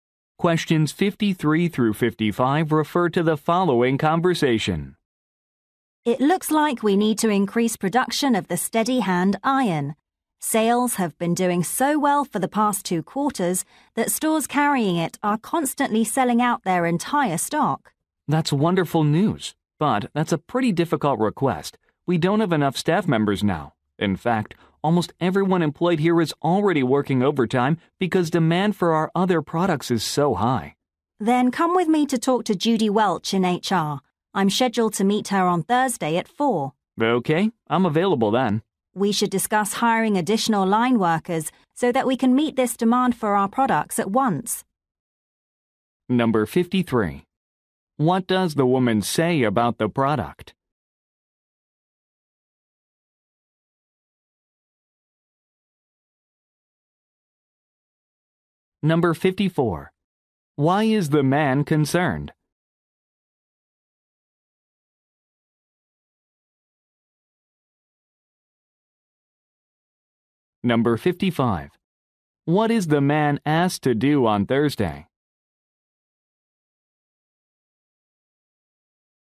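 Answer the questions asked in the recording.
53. It is selling very well
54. There are not enough staff members
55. Meet with Judy Welch in HR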